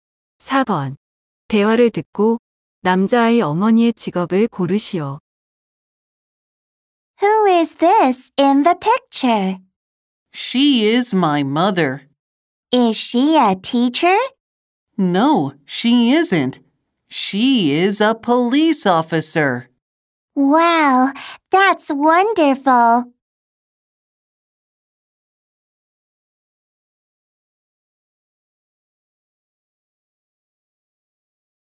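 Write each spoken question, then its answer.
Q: 대화를 듣고 남자아이 어머니의 직업을 고르시오.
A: 경찰관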